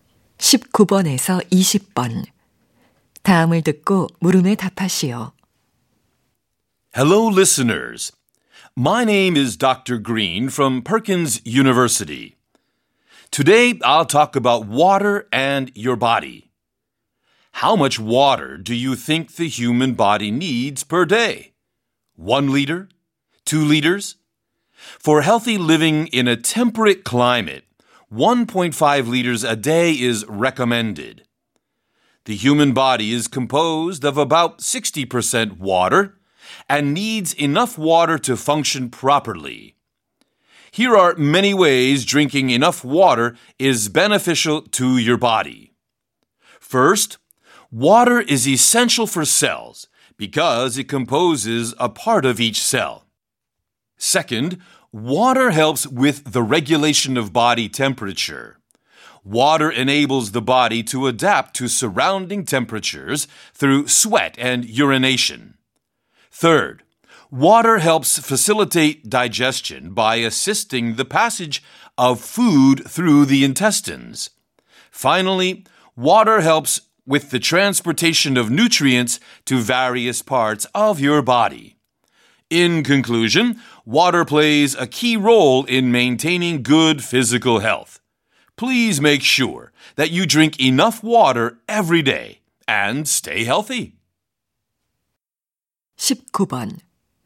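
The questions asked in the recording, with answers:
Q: 남자가 하는 말의 주제로 가장 적절한 것을 고르시오.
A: 물이 신체에 주는 이점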